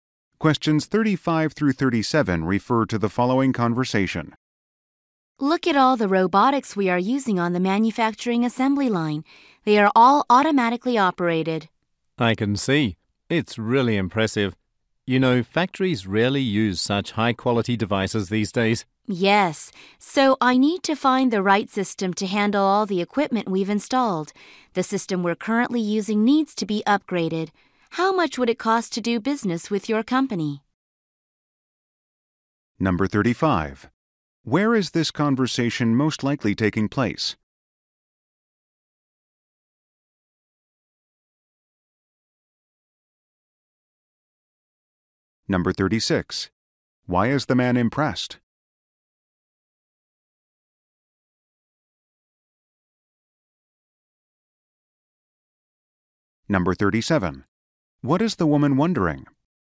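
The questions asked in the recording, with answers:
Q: Where is this conversation most likely taking place?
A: At a factory

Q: Why is the man impressed?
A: The assembly line robots are all automatically operated

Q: What is the woman wondering?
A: How much it would cost to do business with the man's company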